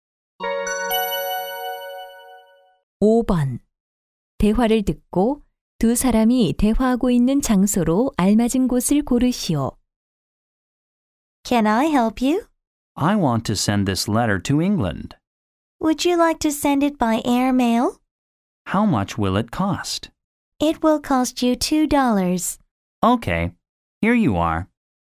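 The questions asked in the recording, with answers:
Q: 대화를 듣고 두 사람이 대화하고 있는 장소로 알맞은 곳을 고르시오.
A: 우체국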